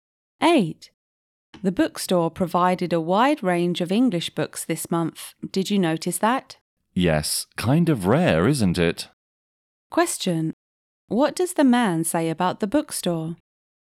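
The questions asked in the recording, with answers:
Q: What does the man say about the bookstore?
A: It rarely offers such a wide range of English books.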